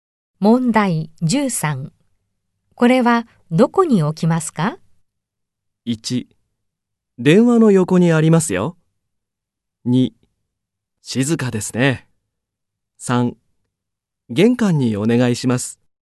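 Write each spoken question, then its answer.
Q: これはどこに置きますか?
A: 3: 玄関にお願いします。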